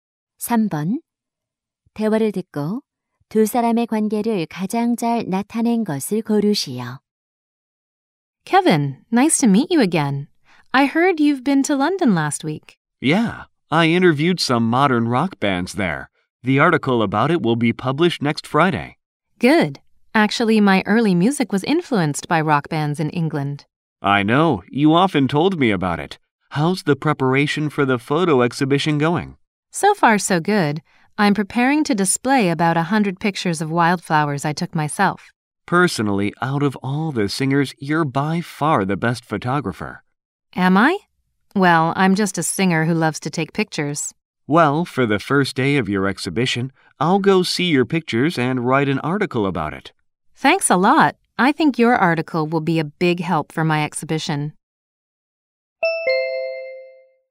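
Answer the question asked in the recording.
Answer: 기자와 가수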